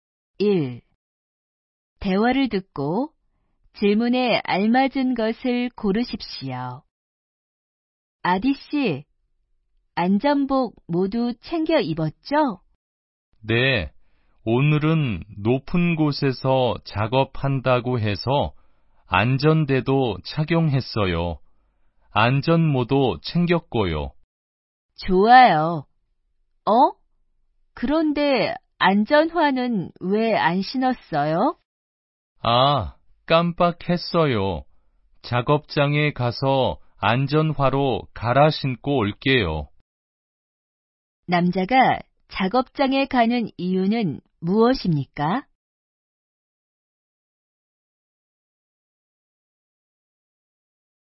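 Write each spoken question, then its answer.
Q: 남자가 작업장에 가는 이유는 무엇입니까?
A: 안전화로 갈아 신으려고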